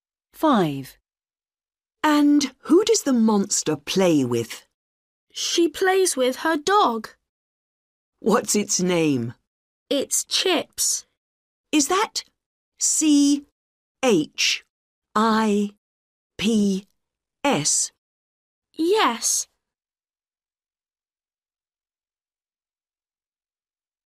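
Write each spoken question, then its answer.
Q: What's its name?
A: Chips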